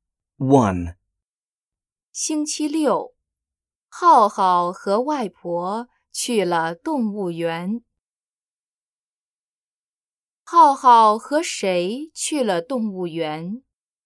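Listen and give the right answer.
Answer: 外婆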